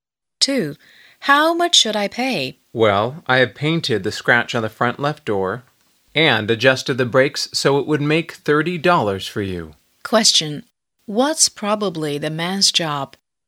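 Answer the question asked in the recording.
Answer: A car mechanic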